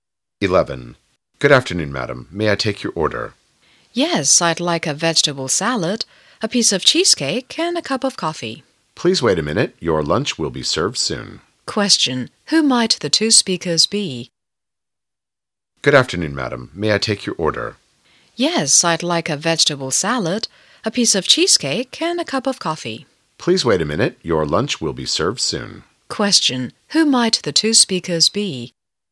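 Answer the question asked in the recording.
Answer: A waiter and a customer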